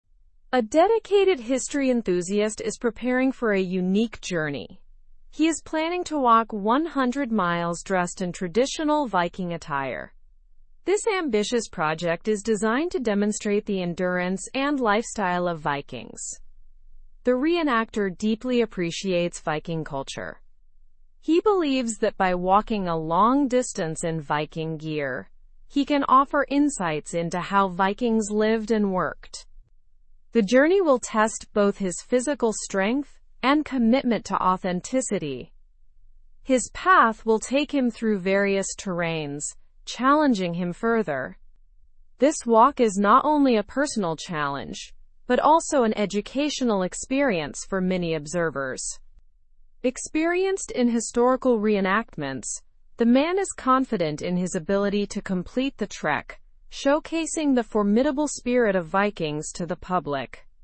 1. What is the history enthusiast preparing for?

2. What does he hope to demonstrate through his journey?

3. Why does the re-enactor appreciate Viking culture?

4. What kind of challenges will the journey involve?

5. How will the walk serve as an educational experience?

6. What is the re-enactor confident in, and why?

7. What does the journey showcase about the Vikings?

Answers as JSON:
{"1": "He is preparing to walk 100 miles in Viking attire.", "2": "He hopes to demonstrate the endurance and lifestyle of Vikings.", "3": "He believes walking in Viking gear offers insights into how Vikings lived and worked.", "4": "The journey will involve navigating various terrains.", "5": "Observers will learn about Viking endurance and lifestyle.", "6": "He is confident in completing the trek due to his experience in historical re-enactments.", "7": "It showcases their formidable spirit."}

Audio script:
A dedicated history enthusiast is preparing for a unique journey. He is planning to walk 100 miles dressed in traditional Viking attire. This ambitious project is designed to demonstrate the endurance and lifestyle of Vikings. The re-enactor deeply appreciates Viking culture. He believes that by walking a long distance in Viking gear, he can offer insights into how Vikings lived and worked. The journey will test both his physical strength and commitment to authenticity. His path will take him through various terrains, challenging him further. This walk is not only a personal challenge but also an educational experience for many observers. Experienced in historical re-enactments, the man is confident in his ability to complete the trek, showcasing the formidable spirit of Vikings to the public.

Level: Level 3